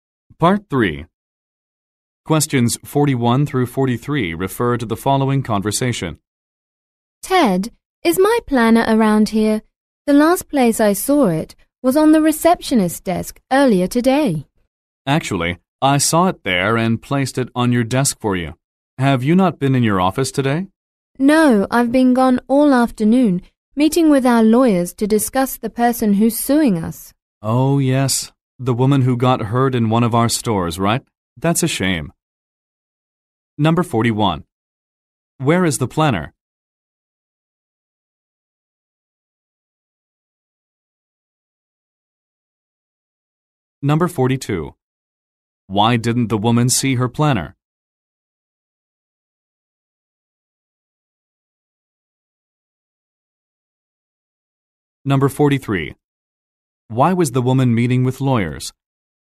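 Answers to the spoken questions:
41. On the woman's desk in her office
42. She has been out of the office all afternoon
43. To discuss a person suing the company after being hurt in a store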